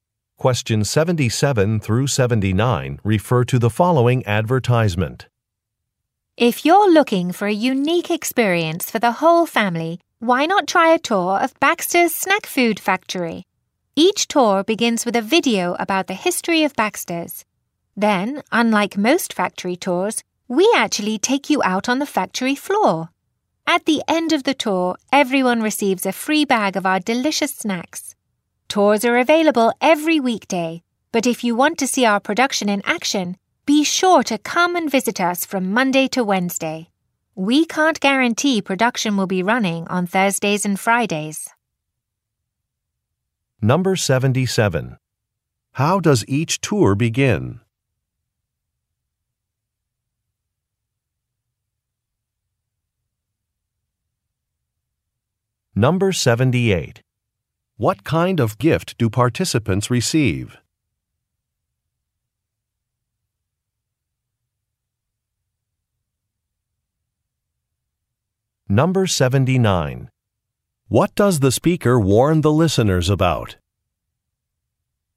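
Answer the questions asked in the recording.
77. With a video about the history of Baxter's
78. A free bag of snacks
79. Production may not be running on Thursdays and Fridays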